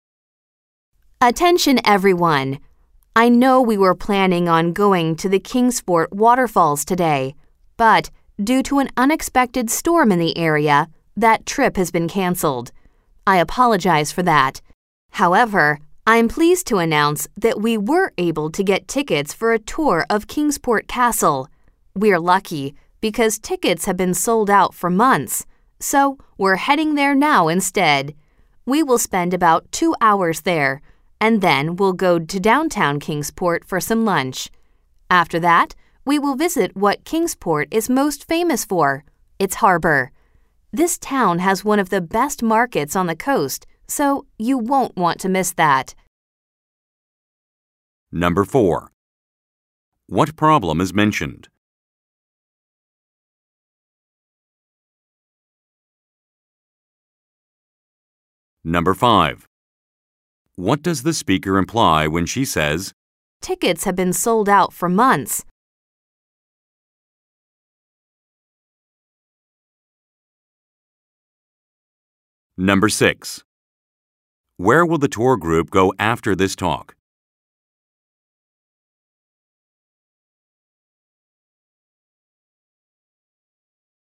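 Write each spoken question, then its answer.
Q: What problem is mentioned?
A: A storm caused the trip to the Kingsport Waterfalls to be canceled.

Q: What does the speaker imply when she says, "Tickets have been sold out for months"?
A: The group was lucky to get tickets because the castle tour is very popular.

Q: Where will the tour group go after this talk?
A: Kingsport Castle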